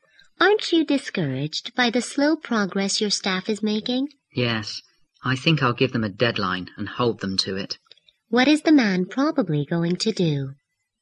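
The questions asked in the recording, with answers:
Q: What is the man probably going to do?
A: Give his staff a deadline and hold them to it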